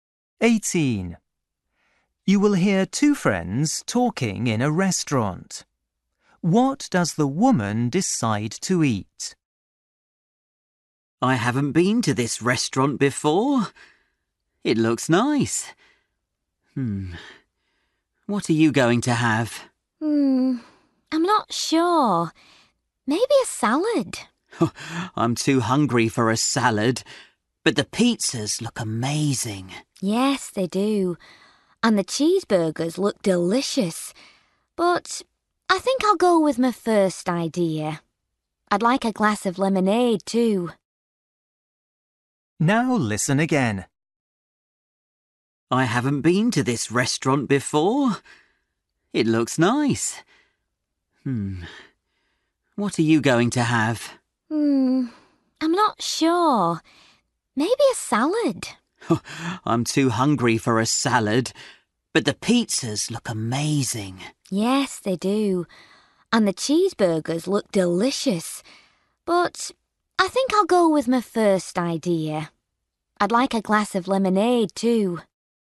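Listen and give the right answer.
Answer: a salad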